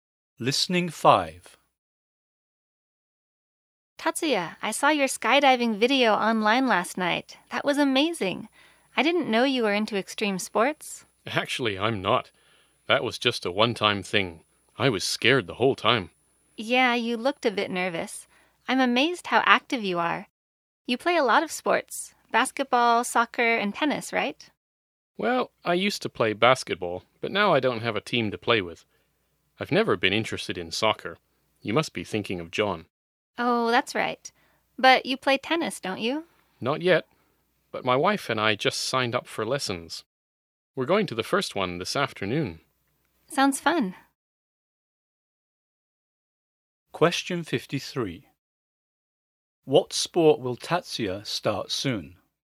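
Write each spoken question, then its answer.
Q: What sport will Tatsuya start soon?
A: Tennis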